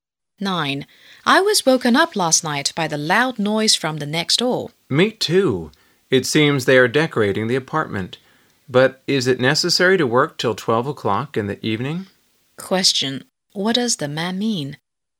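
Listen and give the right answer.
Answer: The neighbors shouldn't work so late at night.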